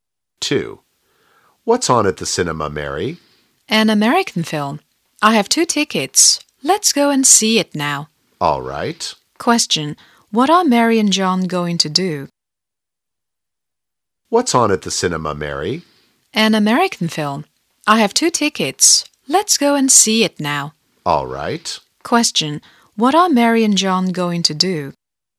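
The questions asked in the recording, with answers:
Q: What are Mary and John going to do?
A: See an American film at the cinema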